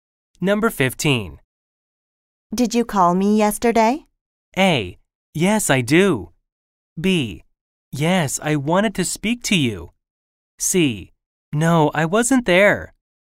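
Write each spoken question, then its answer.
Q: Did you call me yesterday?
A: B: Yes, I wanted to speak to you.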